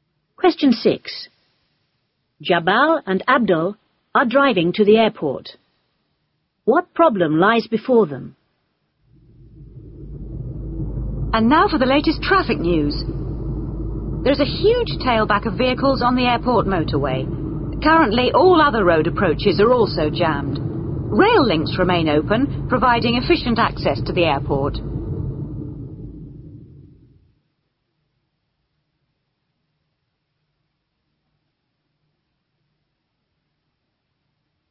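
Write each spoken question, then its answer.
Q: What problem lies before them?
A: A huge traffic tailback on the airport motorway, and all other roads are jammed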